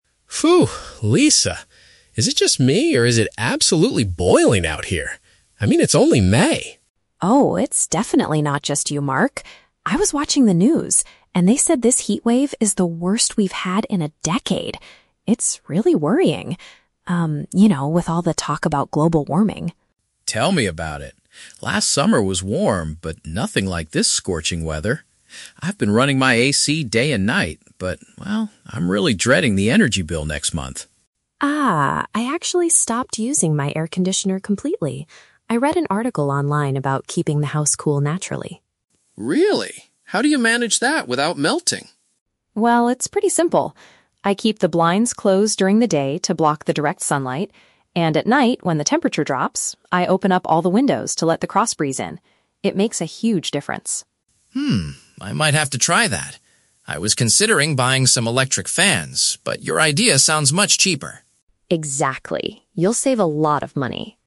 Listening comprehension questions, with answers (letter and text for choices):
Listen to the conversation between two neighbors and choose the correct answer (A, B, or C) for each question.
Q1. What are the speakers mainly discussing?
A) The rising cost of electricity.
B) The unusually high temperatures.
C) A recent news report on air conditioners.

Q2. How does Lisa currently cool her home?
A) By running her air conditioner constantly.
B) By purchasing new electric fans.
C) By using natural ventilation and shade.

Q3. What is Mark likely to do next?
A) Pay his high electricity bill immediately.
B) Attempt Lisa's cost-free cooling method.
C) Buy some new cooling equipment.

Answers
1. B) The unusually high temperatures.
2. C) By using natural ventilation and shade.
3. B) Attempt Lisa's cost-free cooling method.

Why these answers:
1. The main topic is the extreme heat. They use words like "boiling," "heatwave," and "scorching weather."
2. Lisa says she keeps the blinds closed (shade) and opens windows to let the breeze in (natural ventilation). Notice that the exact words "ventilation and shade" are not in the audio (Paraphrasing technique).
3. Mark says, "I might have to try that," referring to Lisa's natural way of cooling the house because it is cheaper.

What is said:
Mark: Phew, Lisa! Is it just me, or is it absolutely boiling out here? I mean, it's only May!
Lisa: Oh, it's definitely not just you, Mark. I was watching the news, and they said this heatwave is the worst we've had in a decade. It's really worrying... um, you know, with all the talk about global warming.
Mark: Tell me about it. Last summer was warm, but nothing like this scorching weather. I've been running my AC day and night, but well, I'm really dreading the energy bill next month.
Lisa: Ah, I actually stopped using my air conditioner completely. I read an article online about keeping the house cool naturally.
Mark: Really? How do you manage that without melting?
Lisa: Well, it's pretty simple. I keep the blinds closed during the day to block the direct sunlight. And, at night, when the temperature drops, I open up all the windows to let the cross breeze in. It makes a huge difference.
Mark: Hmm, I might have to try that. I was considering buying some electric fans, but your idea sounds much cheaper.
Lisa: Exactly! You'll save a lot of money.